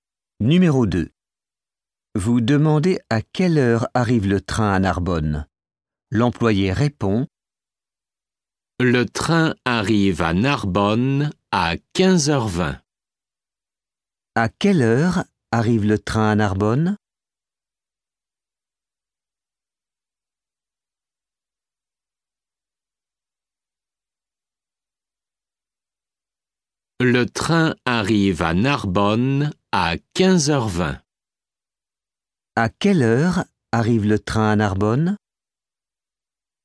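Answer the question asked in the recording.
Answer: À 15h20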